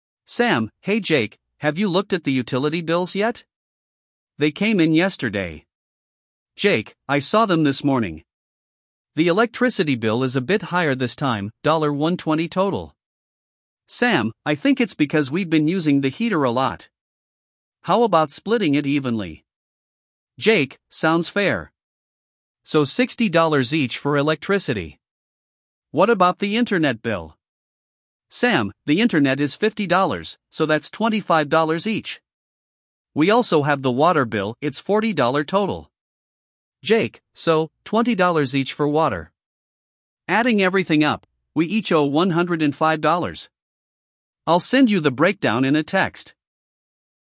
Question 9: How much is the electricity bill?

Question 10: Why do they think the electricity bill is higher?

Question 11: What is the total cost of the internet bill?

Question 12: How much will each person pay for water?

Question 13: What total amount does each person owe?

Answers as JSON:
{"9": "$120", "10": "Using the heater", "11": "$50", "12": "$20 each", "13": "$105"}

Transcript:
Sam: Hey Jake, have you looked at the utility bills yet? They came in yesterday.
Jake: I saw them this morning. The electricity bill is a bit higher this time—$120 total.
Sam: I think it's because we've been using the heater a lot. How about splitting it evenly?
Jake: Sounds fair. So $60 each for electricity. What about the internet bill?
Sam: The internet is $50, so that's $25 each. We also have the water bill—it's $40 total.
Jake: So, $20 each for water. Adding everything up, we each owe $105. I'll send you the breakdown in a text.